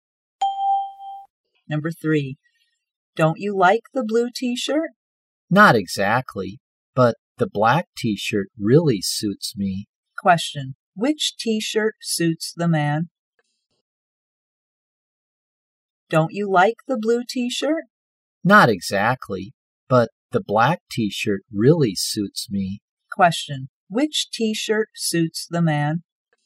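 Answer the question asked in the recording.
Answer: The black one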